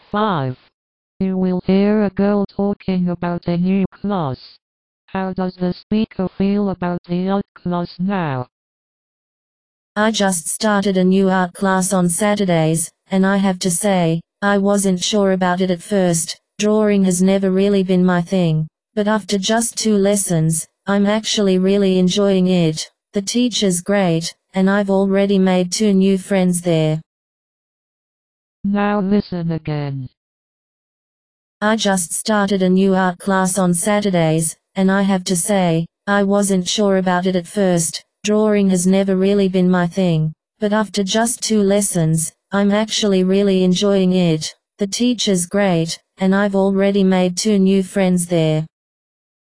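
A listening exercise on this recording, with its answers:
For each question, choose the correct answer.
How does the speaker feel about the art class now?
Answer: She is really enjoying it

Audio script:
You will hear a girl talking about a new class.
WomanI just started a new art class on Saturdays, and I have to say, I wasn't sure about it at first — drawing has never really been my thing. But after just two lessons, I'm actually really enjoying it. The teacher's great, and I've already made two new friends there.

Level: KET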